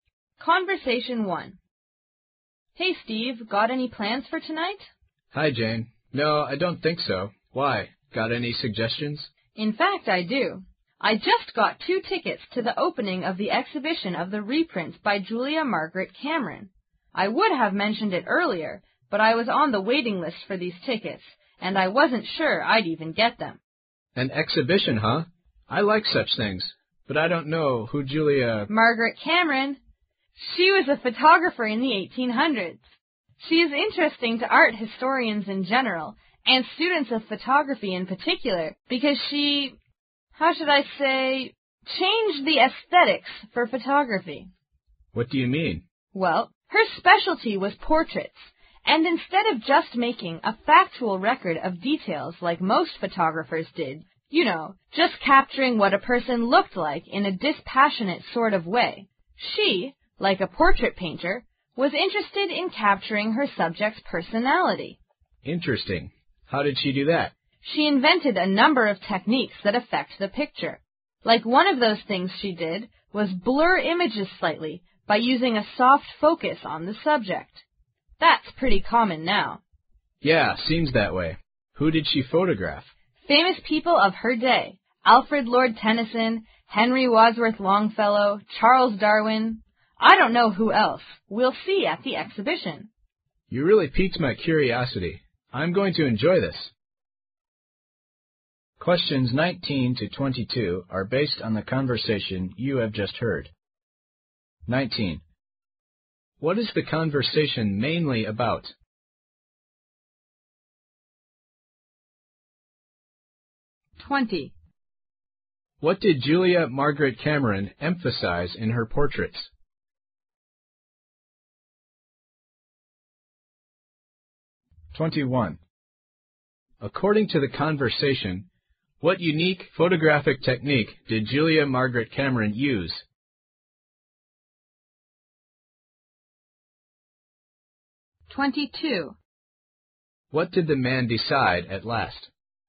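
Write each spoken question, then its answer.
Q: What is the conversation mainly about?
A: An exhibition of Julia Margaret Cameron's photographs

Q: What did Julia Margaret Cameron emphasize in her portraits?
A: Her subjects' personality

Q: According to the conversation, what unique photographic technique did Julia Margaret Cameron use?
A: Blurring images slightly with a soft focus

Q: What did the man decide at last?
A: To go to the exhibition with Jane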